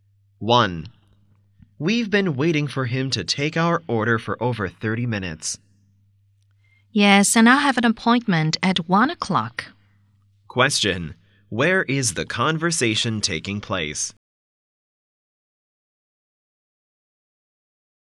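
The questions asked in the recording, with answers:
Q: Where is the conversation taking place?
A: In a restaurant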